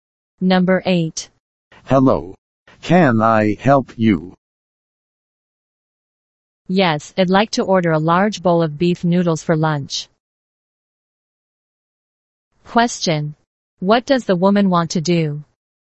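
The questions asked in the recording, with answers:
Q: What does the woman want to do?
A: Order a large bowl of beef noodles for lunch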